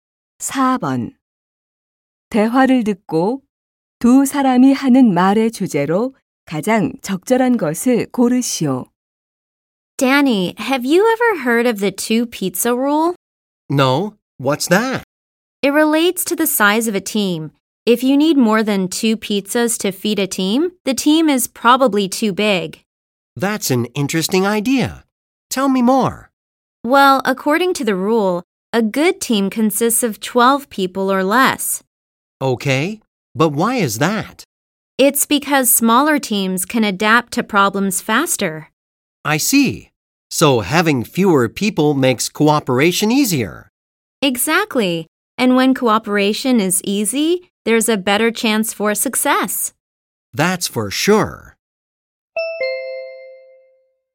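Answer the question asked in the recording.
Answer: 팀 규모가 작을수록 협력과 성공에 유리하다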